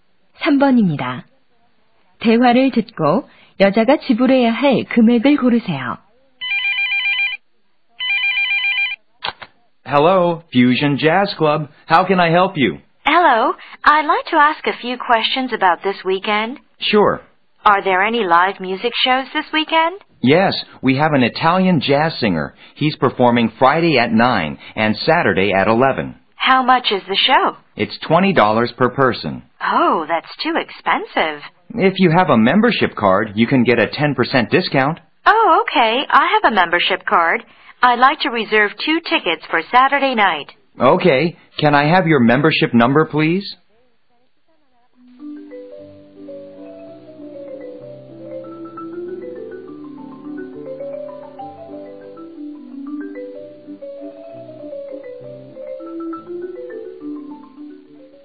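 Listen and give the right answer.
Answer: 36달러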